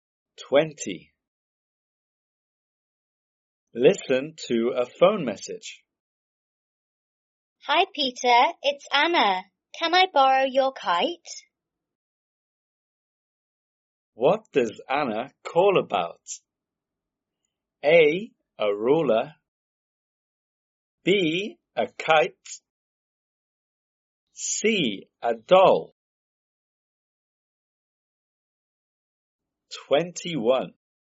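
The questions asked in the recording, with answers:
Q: What does Anna call about?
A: B: A kite.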